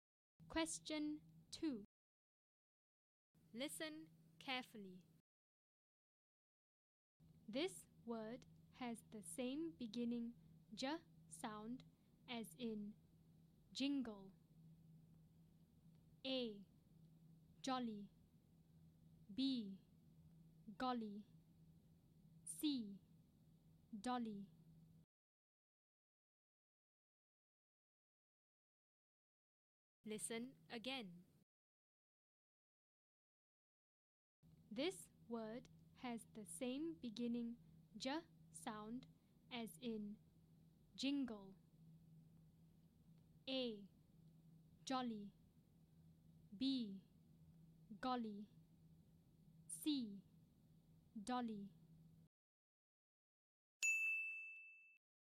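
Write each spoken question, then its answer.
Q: This word has the same beginning J sound as in jingle.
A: A: Jolly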